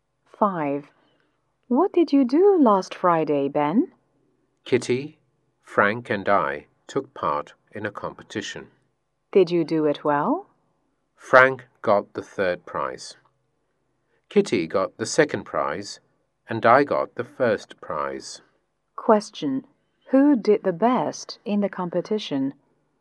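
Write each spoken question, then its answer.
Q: Who did the best in the competition?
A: Ben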